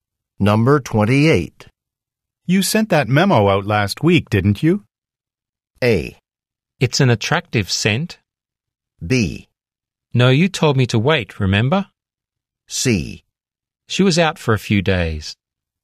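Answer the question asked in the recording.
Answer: B: No, you told me to wait, remember?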